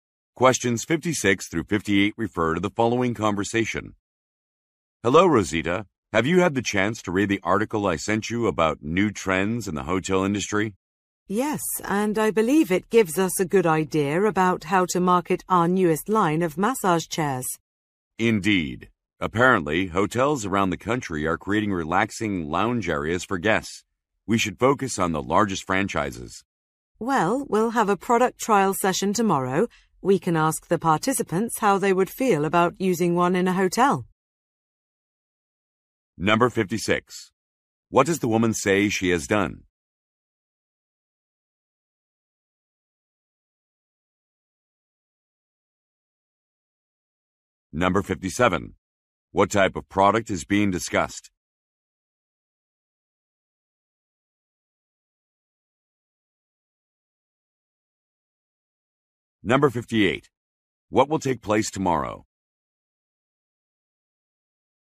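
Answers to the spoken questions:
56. Read an article
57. Massage chairs
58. A product trial session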